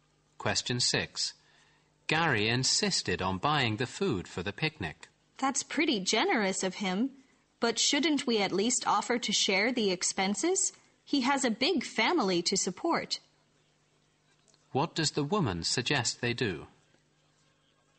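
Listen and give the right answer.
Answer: Offer to share the cost of the picnic food with Gary.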